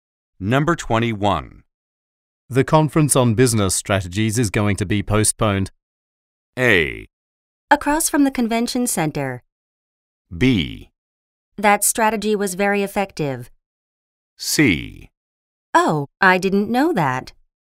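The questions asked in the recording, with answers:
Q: The conference on business strategies is going to be postponed.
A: C: Oh, I didn't know that.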